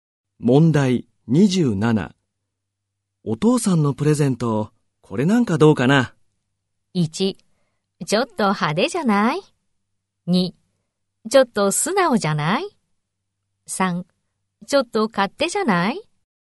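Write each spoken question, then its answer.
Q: お父さんのプレゼント、これなんかどうかな?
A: 1: ちょっと派手じゃない?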